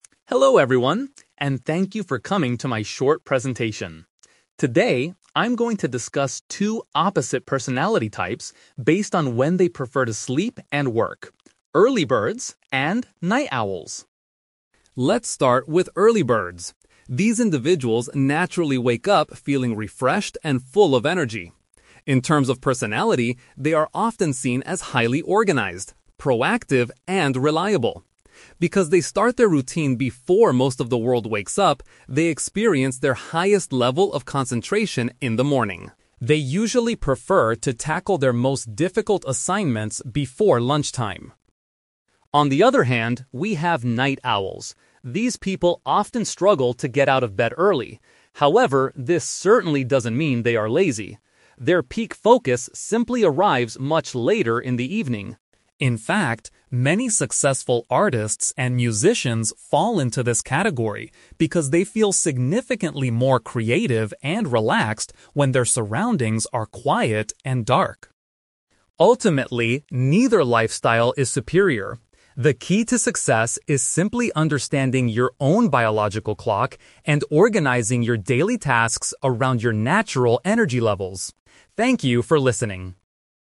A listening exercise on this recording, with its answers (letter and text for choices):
Listen to a student giving a presentation about sleep habits and personality. For each question, choose the correct answer A, B, or (C).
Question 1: How does the speaker describe the personality of an "Early Bird"?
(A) They are naturally creative and relaxed.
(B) They are dependable and plan things well.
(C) They are generally happier than other people.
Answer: (B) They are dependable and plan things well.

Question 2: When do Early Birds usually prefer to do their hardest work?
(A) After they finish eating their midday meal.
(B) During the very late hours of the night.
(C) Sometime before the middle of the day.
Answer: (C) Sometime before the middle of the day.

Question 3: According to the speaker, why do many artists consider themselves "Night Owls"?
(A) They find it easier to produce original ideas in a peaceful environment.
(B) They are often too lazy to wake up early and go to an office.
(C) They have to perform at concerts and events late at night.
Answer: (A) They find it easier to produce original ideas in a peaceful environment.

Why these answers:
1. The speaker says Early Birds are "highly organized, proactive, and reliable." The word "dependable" is a synonym for reliable, and "plan things well" means being organized.
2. The speaker mentions that Early Birds prefer to tackle their most difficult assignments "before lunchtime." The middle of the day is a paraphrase for lunchtime.
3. The speaker states that artists feel "significantly more creative and relaxed when their surroundings are quiet and dark." Producing original ideas is a paraphrase for being "creative", and a peaceful environment means "quiet and dark" surroundings.

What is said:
Student Speaker: Hello everyone, and thank you for coming to my short presentation. Today, I'm going to discuss two opposite personality types based on when they prefer to sleep and work: "Early Birds" and "Night Owls".
Let's start with Early Birds. These individuals naturally wake up feeling refreshed and full of energy. In terms of personality, they are often seen as highly organized, proactive, and reliable. Because they start their routine before most of the world wakes up, they experience their highest level of concentration in the morning. They usually prefer to tackle their most difficult assignments before lunchtime.
On the other hand, we have Night Owls. These people often struggle to get out of bed early. However, this certainly doesn't mean they are lazy. Their peak focus simply arrives much later in the evening. In fact, many successful artists and musicians fall into this category because they feel significantly more creative and relaxed when their surroundings are quiet and dark.
Ultimately, neither lifestyle is superior. The key to success is simply understanding your own biological clock and organizing your daily tasks around your natural energy levels.